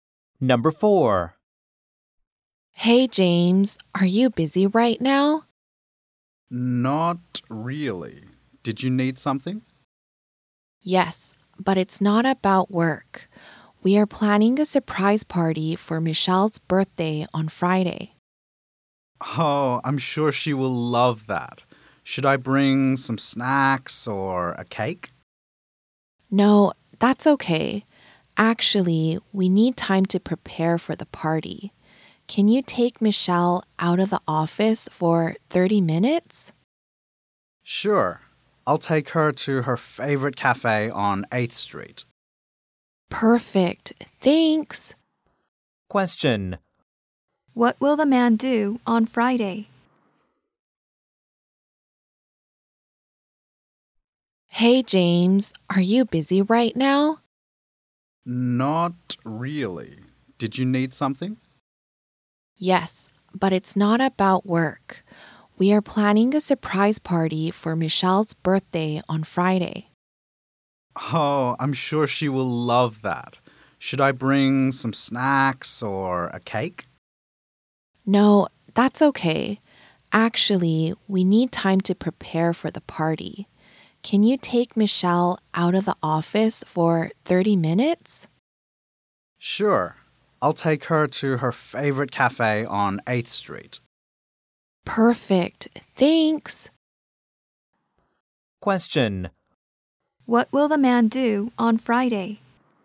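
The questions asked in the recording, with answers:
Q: What will the man do on Friday?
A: Take Michelle to her favorite cafe on 8th Street for 30 minutes.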